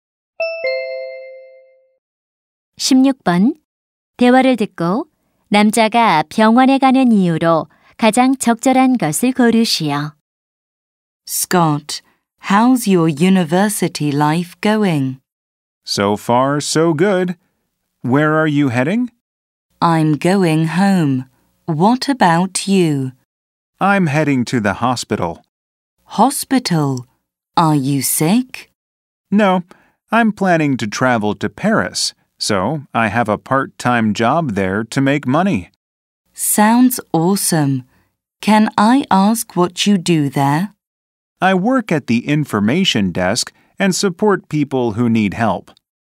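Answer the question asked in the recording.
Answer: 아르바이트를 하려고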